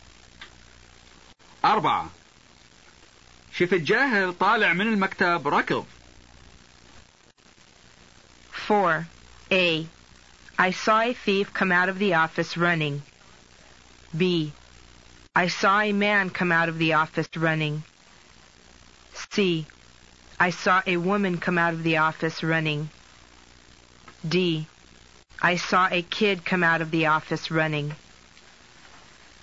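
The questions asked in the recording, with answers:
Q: شف الجاهل طالع من المكتب ركض.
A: D: I saw a kid come out of the office running.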